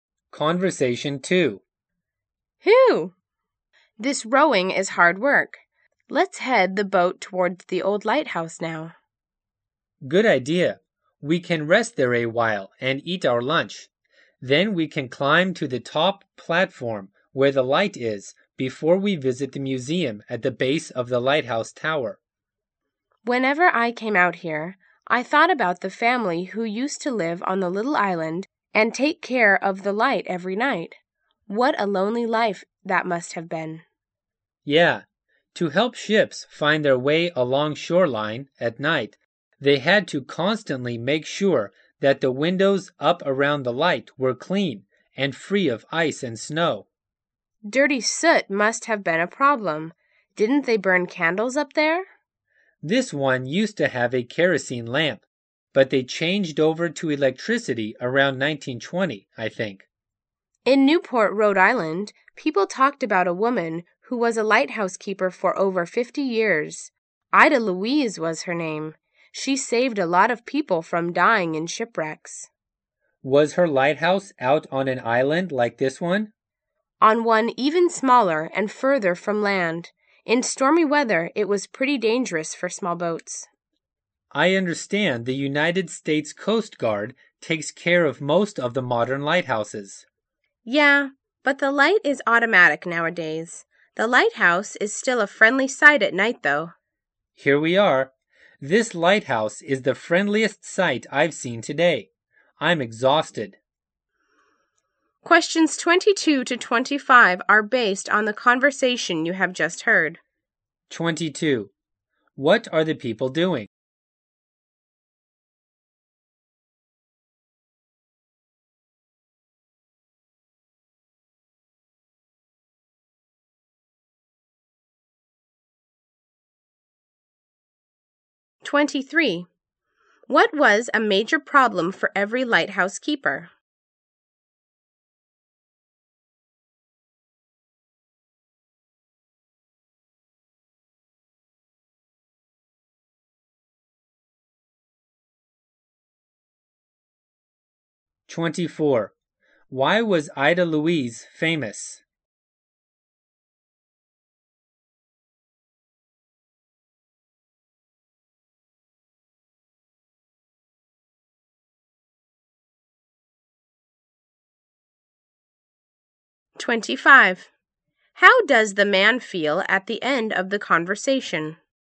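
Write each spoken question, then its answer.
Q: What are the people doing?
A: Rowing a boat to a lighthouse.

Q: What was a major problem for every lighthouse keeper?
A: Keeping the windows clean.

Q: Why was Ida Louise famous?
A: She saved many people from shipwrecks.

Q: How does the man feel at the end of the conversation?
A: Tired.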